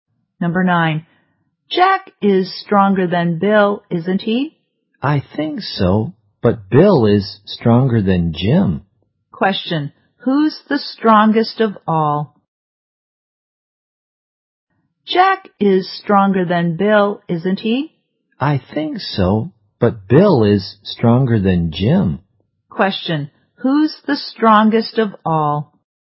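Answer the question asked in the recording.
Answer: Jack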